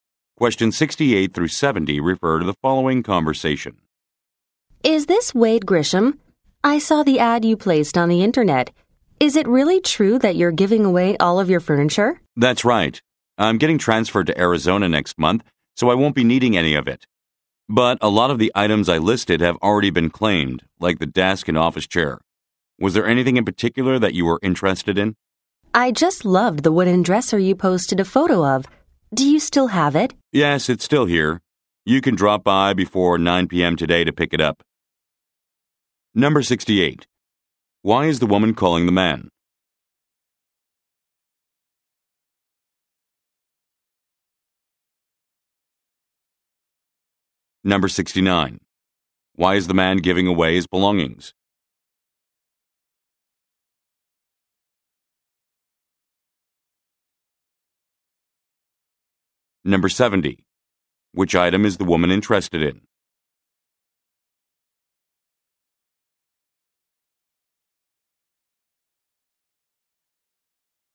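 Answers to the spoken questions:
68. To respond to his internet ad about giving away furniture
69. He is being transferred to Arizona
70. The wooden dresser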